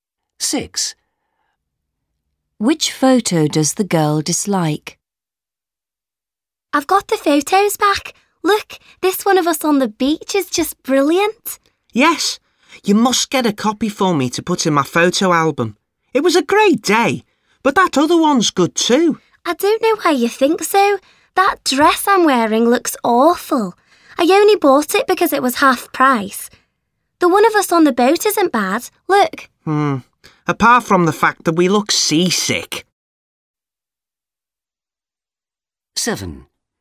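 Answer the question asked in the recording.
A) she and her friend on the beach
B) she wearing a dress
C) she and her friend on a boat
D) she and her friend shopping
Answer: B) she wearing a dress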